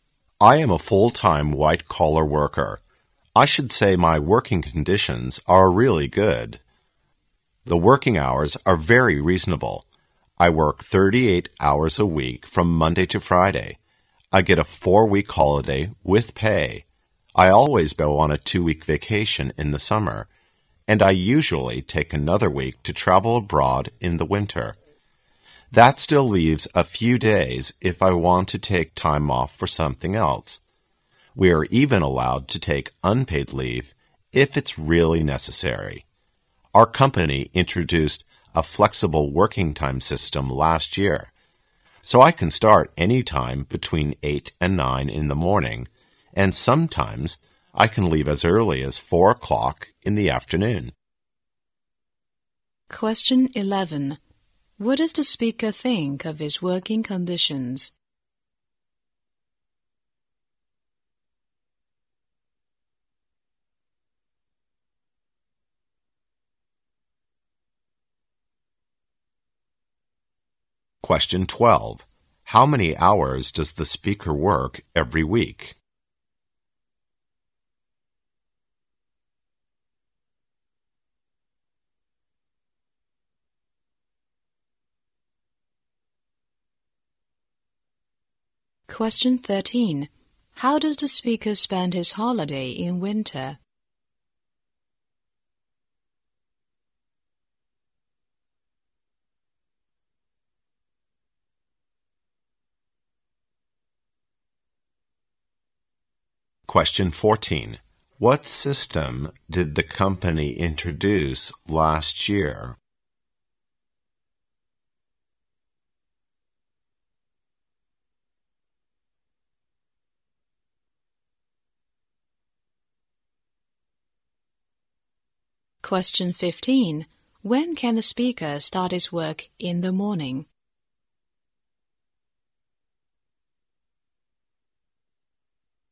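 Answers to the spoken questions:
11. Really good
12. 38 hours
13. Traveling abroad
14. A flexible working time system
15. Between 8 and 9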